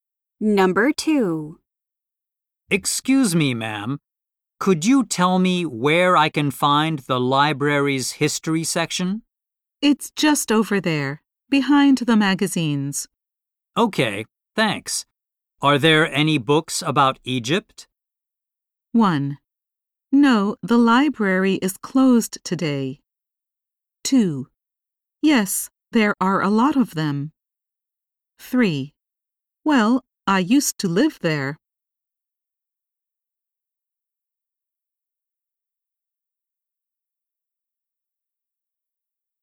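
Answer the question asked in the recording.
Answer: 2: Yes, there are a lot of them.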